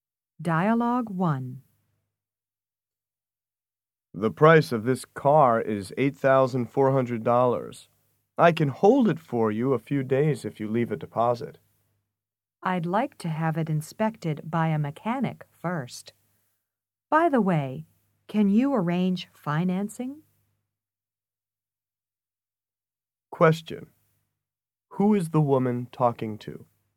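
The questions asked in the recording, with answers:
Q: Who is the woman talking to?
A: A car salesman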